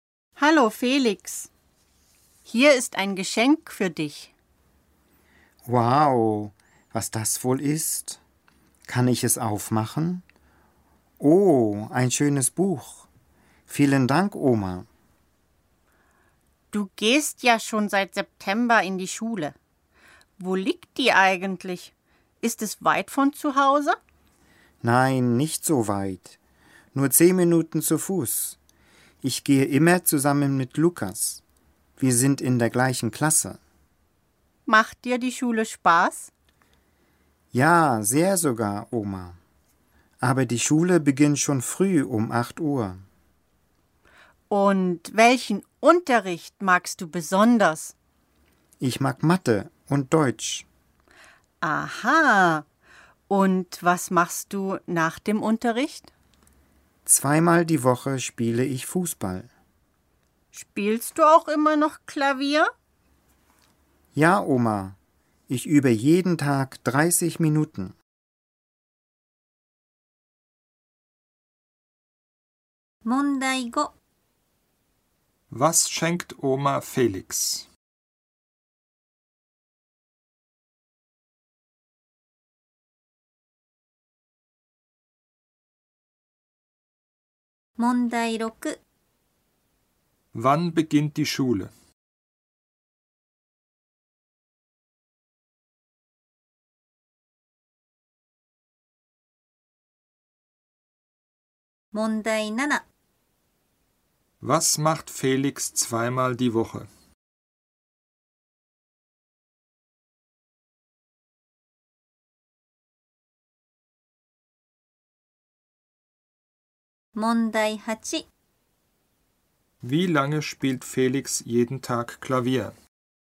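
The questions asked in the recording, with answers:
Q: Was schenkt Oma Felix?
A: Ein Buch

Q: Wann beginnt die Schule?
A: Um 8 Uhr

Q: Was macht Felix 2x die Woche?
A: Fußball spielen

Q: Wie lange spielt Felix jeden Tag Klavier?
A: 30 Minuten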